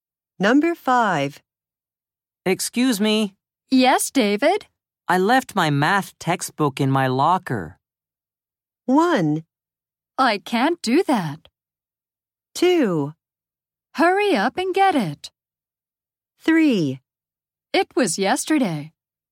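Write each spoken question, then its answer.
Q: I left my math textbook in my locker.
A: 2: Hurry up and get it.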